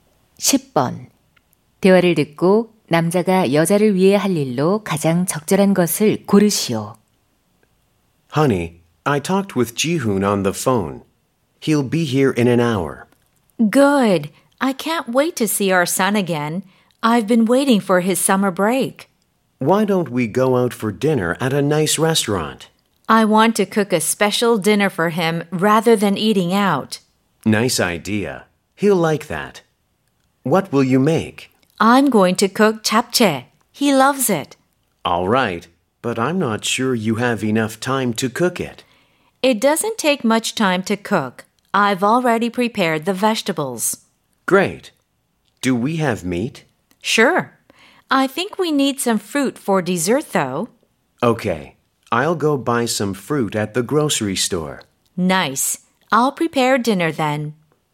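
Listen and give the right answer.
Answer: 식료품점에서 과일 사 오기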